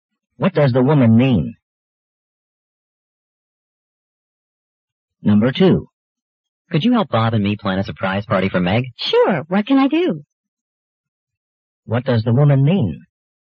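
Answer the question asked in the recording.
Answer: She's willing to help plan the party.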